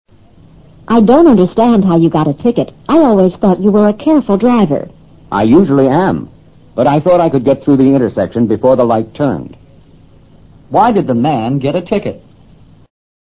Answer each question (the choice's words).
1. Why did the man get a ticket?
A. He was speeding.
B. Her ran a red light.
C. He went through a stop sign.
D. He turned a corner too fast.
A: Her ran a red light.

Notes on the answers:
这是一段有关违反交通规则罚款的对话。答案是依据I thought I could get through the intersection before the light turned 一句提供的信息做出的推断。这句话说"我以为在灯变以前可以通过路口。"light 指的是指挥交通的红绿灯。这话的含义显然是在他通过路口时绿灯已变成红灯。所以是"闯了红灯"。ticket:罚款通知单。speeding :超速行驶。stop sign: 停车标志。

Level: 世博高级听说